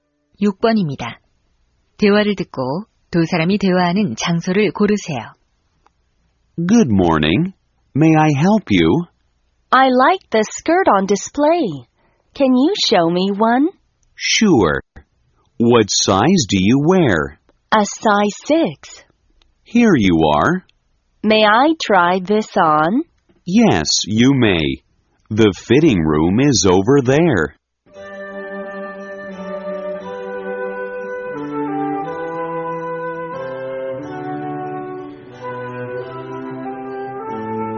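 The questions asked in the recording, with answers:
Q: 대화를 듣고 두 사람이 대화하는 장소를 고르세요.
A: 옷 가게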